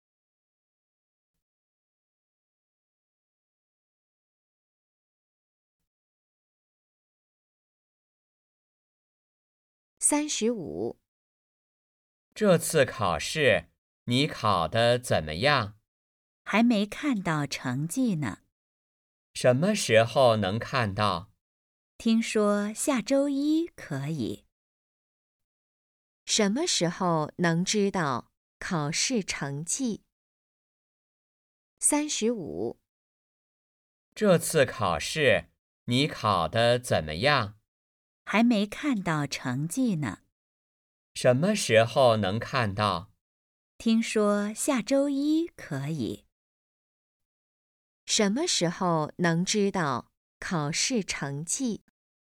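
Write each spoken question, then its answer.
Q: 什么时候能知道考试成绩?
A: 下周一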